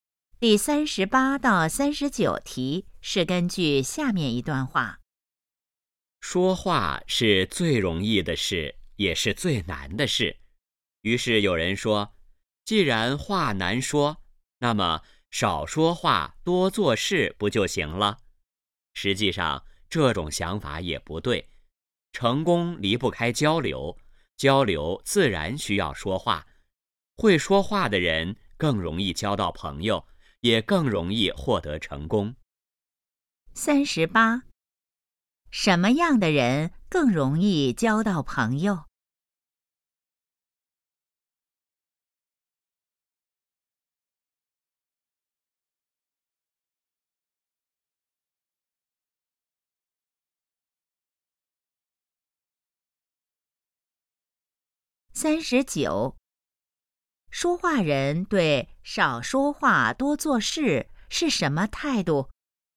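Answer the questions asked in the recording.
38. 会说话的人
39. 不同意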